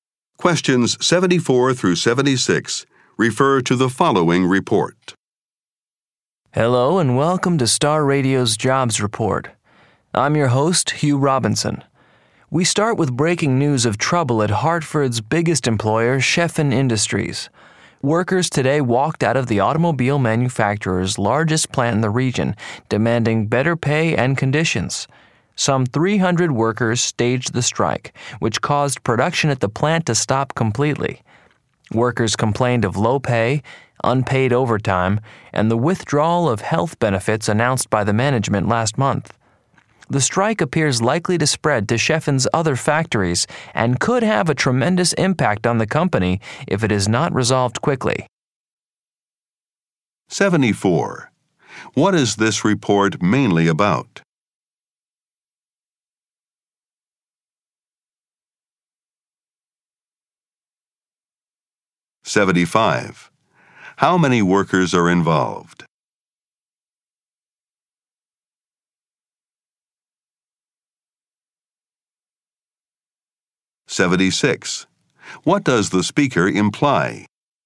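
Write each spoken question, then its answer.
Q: What is this report mainly about?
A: A workers' strike at Sheffin Industries

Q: How many workers are involved?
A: About 300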